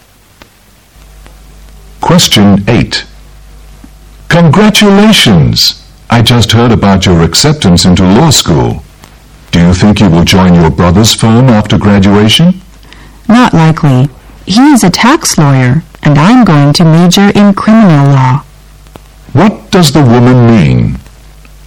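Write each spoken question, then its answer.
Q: What does the woman mean?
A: She probably won't join her brother's firm, because she will study criminal law and he is a tax lawyer.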